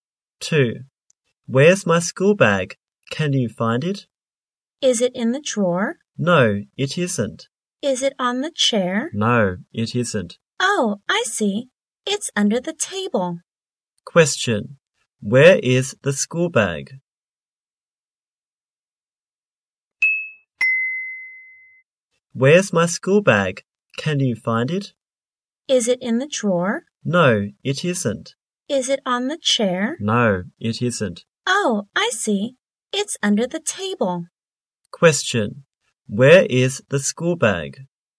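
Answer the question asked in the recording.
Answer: Under the table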